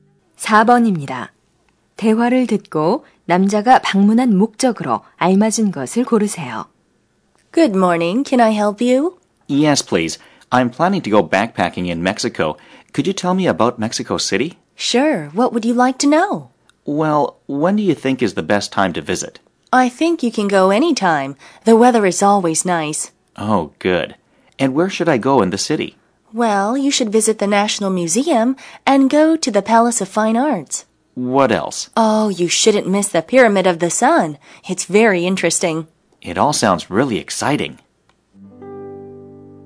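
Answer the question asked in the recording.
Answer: 멕시코시티 여행 정보를 얻으려고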